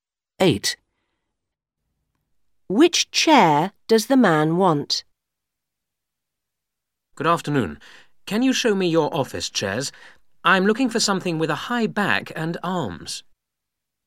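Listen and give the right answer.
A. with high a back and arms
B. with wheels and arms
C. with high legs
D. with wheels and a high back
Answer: A. with high a back and arms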